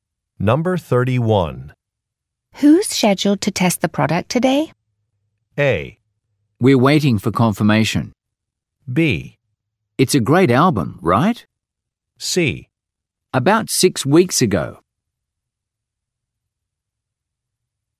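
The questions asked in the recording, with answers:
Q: Who's scheduled to test the product today?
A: A: We're waiting for confirmation.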